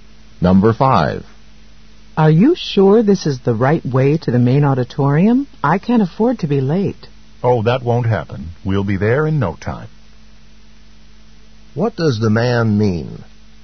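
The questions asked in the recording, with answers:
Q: What does the man mean?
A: They will get there soon and won't be late.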